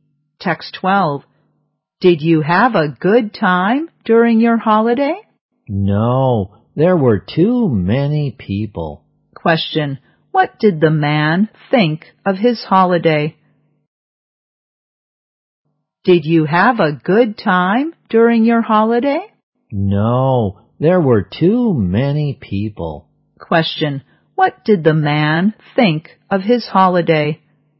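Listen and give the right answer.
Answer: He didn't enjoy it; there were too many people.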